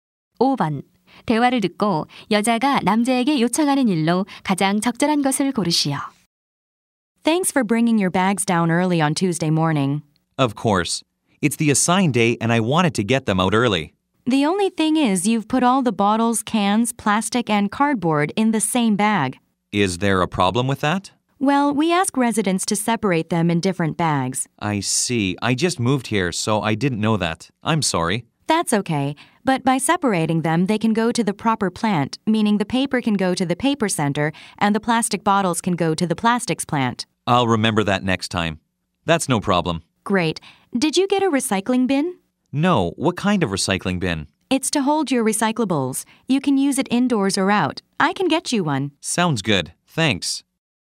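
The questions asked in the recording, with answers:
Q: 대화를 듣고 여자가 남자에게 요청하는 일로 가장 적절한 것을 고르시오.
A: 재활용품을 종류별로 분리해서 배출하기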